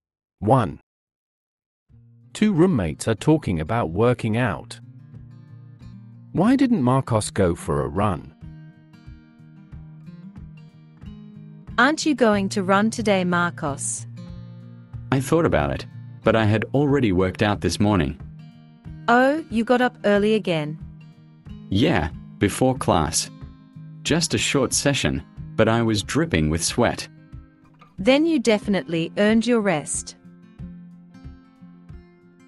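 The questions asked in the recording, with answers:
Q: Why didn't Marcos go for a run?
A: He had already worked out that morning.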